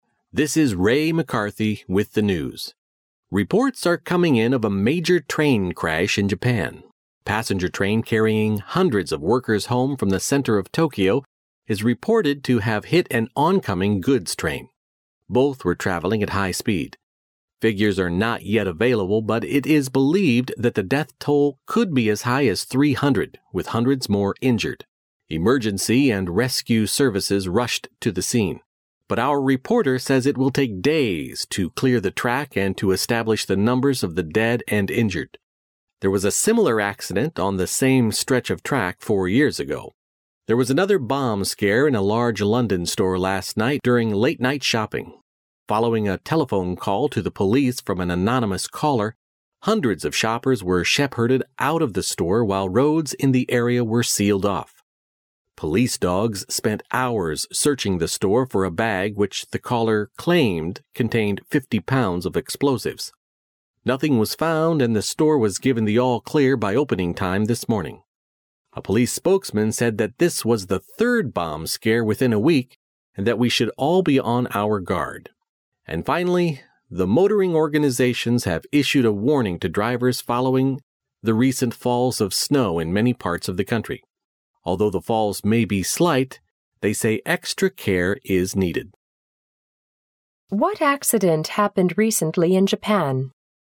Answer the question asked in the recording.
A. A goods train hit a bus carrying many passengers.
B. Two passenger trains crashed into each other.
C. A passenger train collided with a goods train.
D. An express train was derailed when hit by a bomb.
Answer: C. A passenger train collided with a goods train.

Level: 大学英语六级